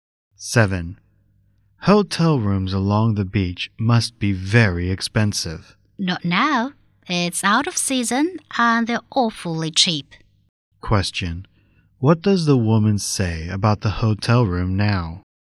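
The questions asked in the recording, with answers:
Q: What does the woman say about the hotel room now?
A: They are very cheap because it's out of season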